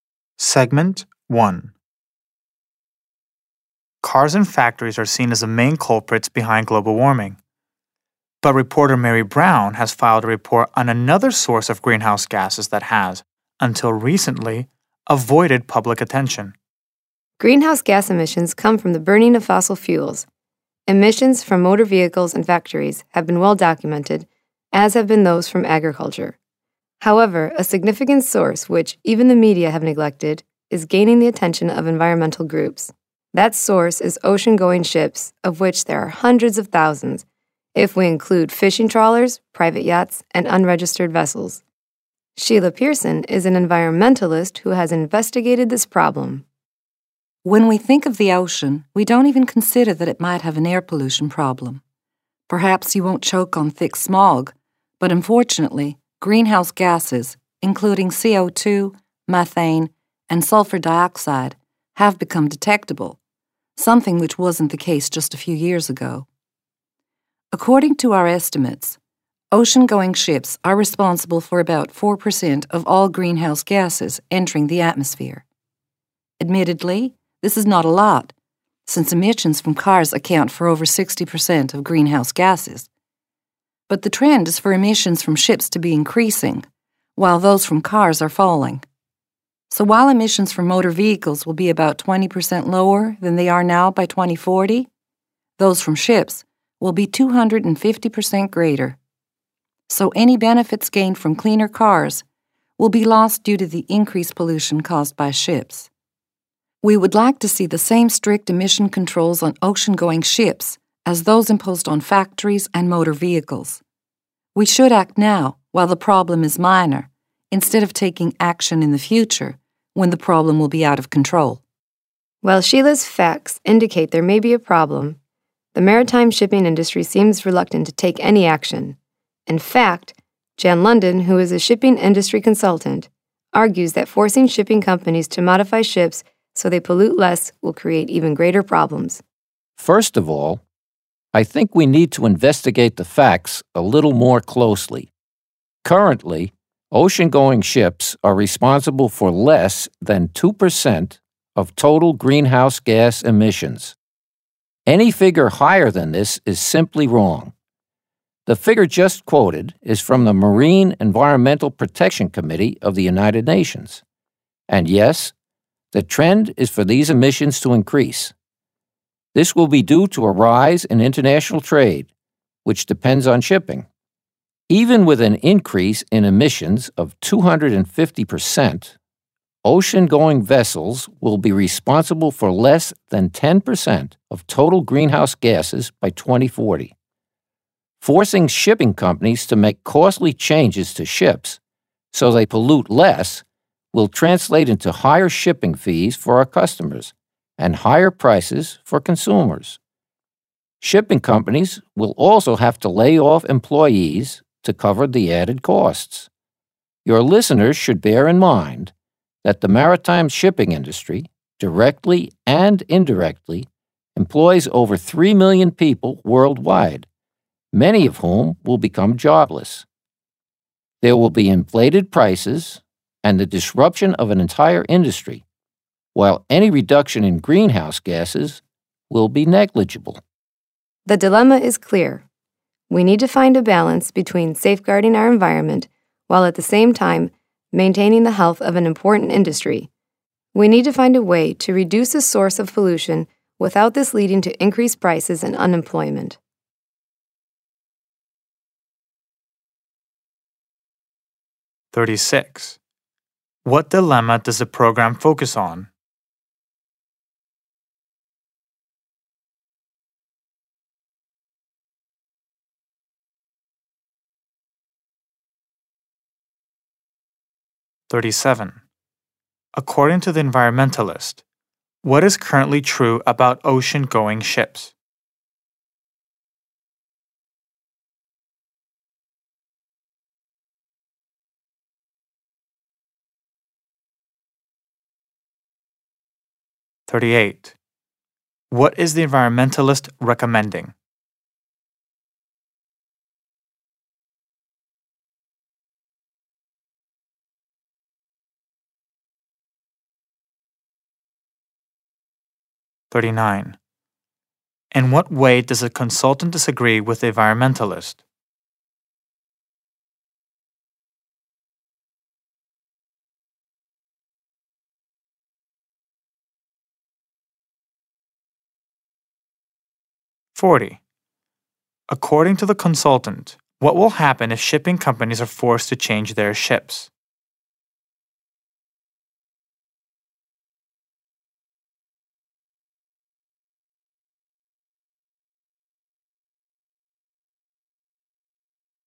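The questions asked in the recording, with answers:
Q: What dilemma does the program focus on?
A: How to reduce pollution from ocean-going ships without raising prices and causing unemployment in the shipping industry

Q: According to the environmentalist, what is currently true about ocean-going ships?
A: They produce about 4% of all greenhouse gases, and their emissions are increasing

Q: What is the environmentalist recommending?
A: Putting the same strict emission controls on ships as on factories and motor vehicles, and doing it now

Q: In what way does a consultant disagree with the environmentalist?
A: He disputes her figures: ships produce less than 2% of emissions, not 4%

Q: According to the consultant, what will happen if shipping companies are forced to change their ships?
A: Shipping fees and consumer prices will rise, and many workers will lose their jobs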